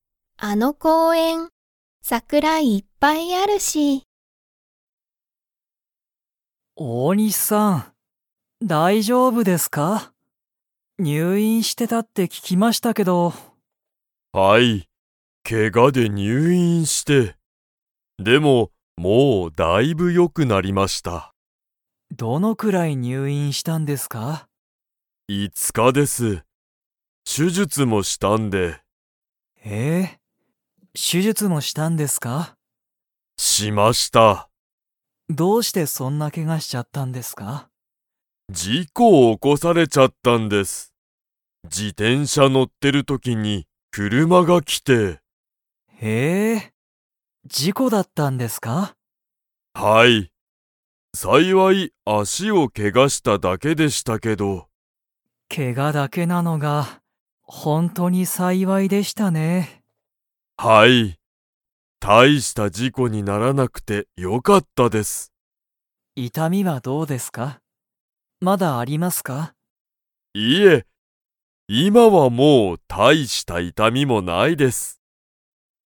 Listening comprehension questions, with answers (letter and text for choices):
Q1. 大西おおにしさんは、 のせいでけがをした。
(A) 料理りょうり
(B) 仕事しごと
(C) 事故じこ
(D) 電車でんしゃ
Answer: (C) 事故じこ

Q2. 大西おおにしさんの足あしには、まだ強つよい痛いたみがありますか?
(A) はい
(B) いいえ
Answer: (B) いいえ

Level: Level 4